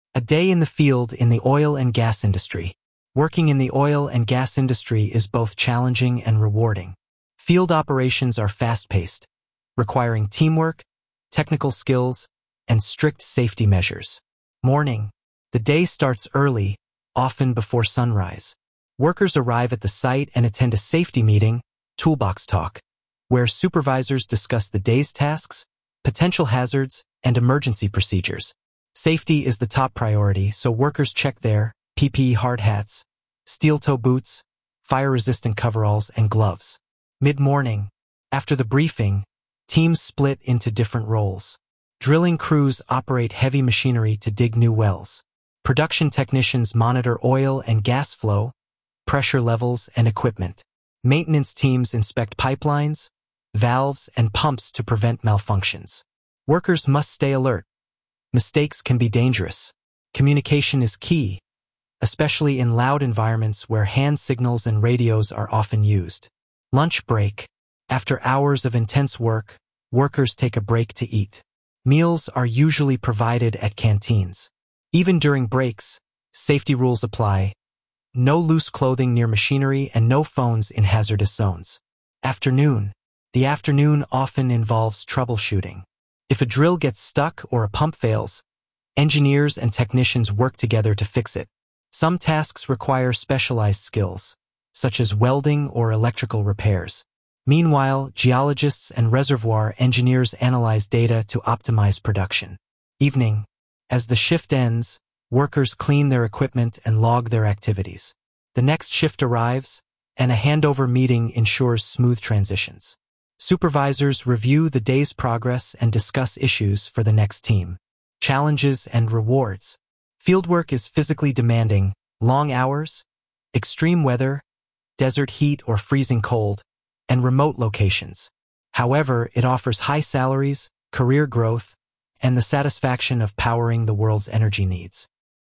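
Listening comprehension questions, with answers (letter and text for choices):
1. According to the audio that you listened to, what role do geologists play in the field?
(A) They analyze data to optimize production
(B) They train the crew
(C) They design PPE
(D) They drive trucks only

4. According to the audio that you listened to, which is NOT a challenge of oilfield work?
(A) Remote locations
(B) Extreme weather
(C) Physically demanding tasks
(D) Short working hours (only 1 hour per day)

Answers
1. (A) They analyze data to optimize production
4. (D) Short working hours (only 1 hour per day)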